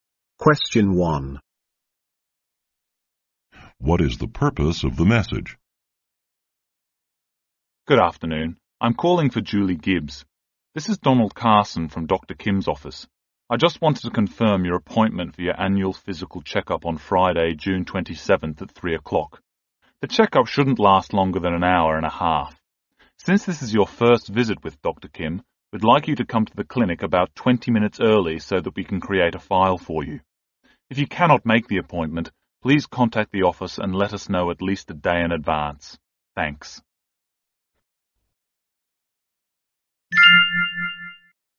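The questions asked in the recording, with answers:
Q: What is the purpose of the message?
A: To confirm a checkup appointment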